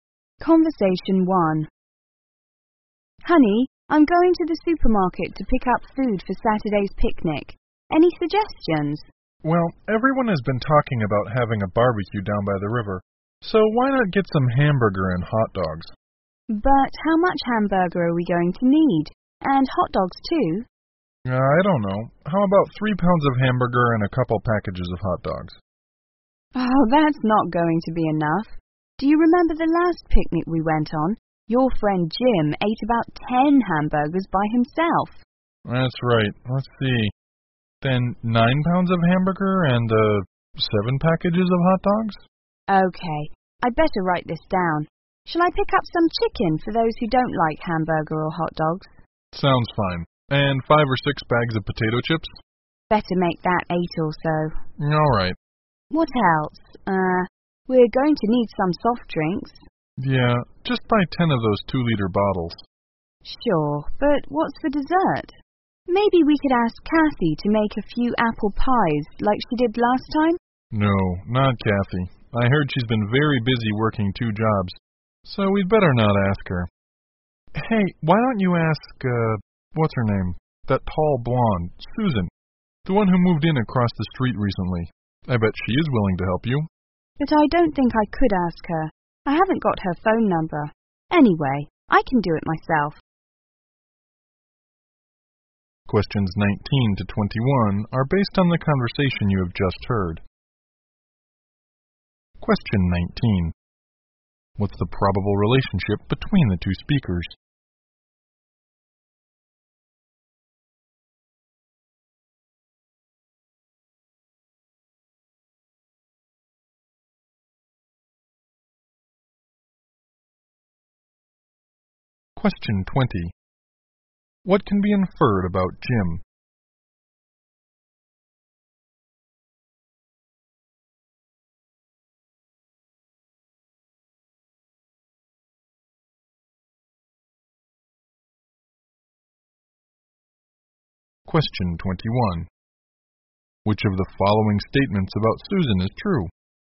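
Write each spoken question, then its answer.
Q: What can be inferred about Jim?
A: He eats a lot; he ate about 10 hamburgers at the last picnic

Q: Which of the following statements about Susan is true?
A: She recently moved in across the street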